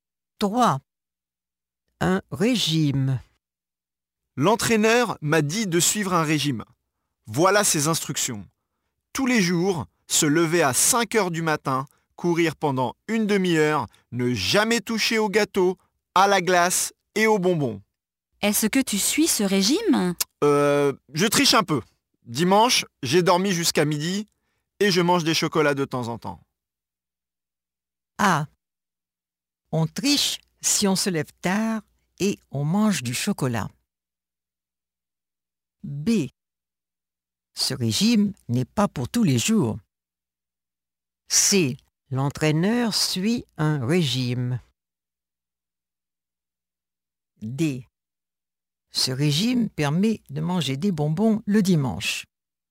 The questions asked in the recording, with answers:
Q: Un régime.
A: A. On triche si on se lève tard et on mange du chocolat.